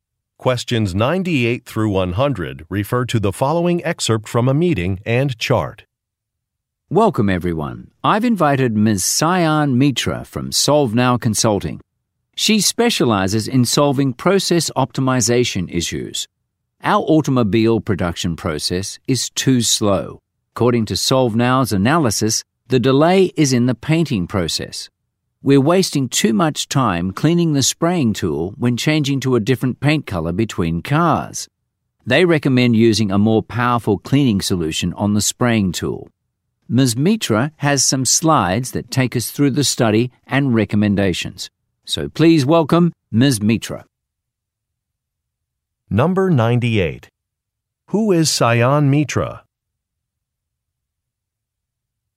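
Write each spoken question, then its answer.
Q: Who is Sayan Mitra?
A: A consultant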